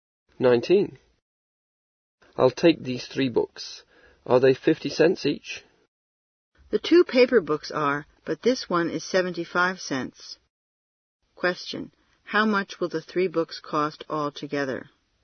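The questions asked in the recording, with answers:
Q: How much will the 3 books cost altogether?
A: $1.75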